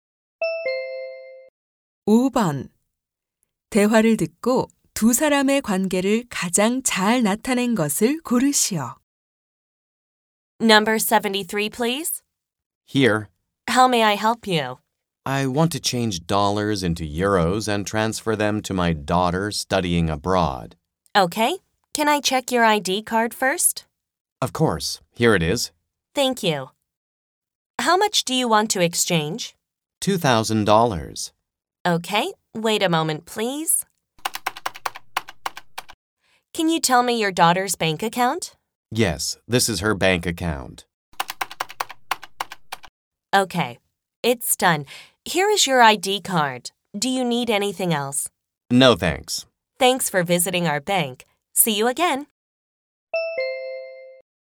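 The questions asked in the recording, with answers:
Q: 대화를 듣고 두 사람의 관계를 가장 잘 나타낸 것을 고르시오.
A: 은행 직원 - 고객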